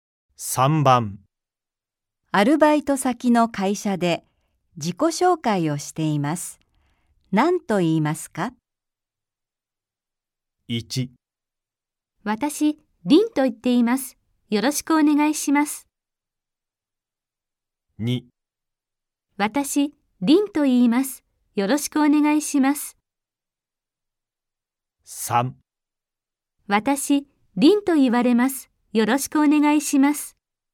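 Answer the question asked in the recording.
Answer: 2: 私、リンと言います。よろしくお願いします。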